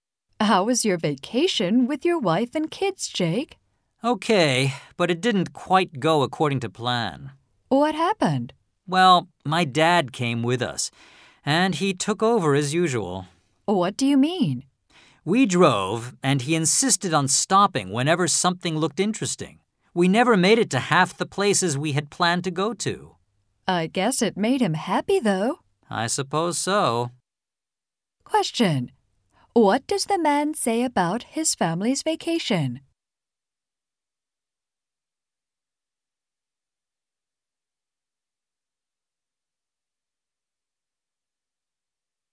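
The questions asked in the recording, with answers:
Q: What does the man say about his family's vacation?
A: It didn't go as planned because his dad kept stopping at interesting places, so they missed half the places they had planned to visit.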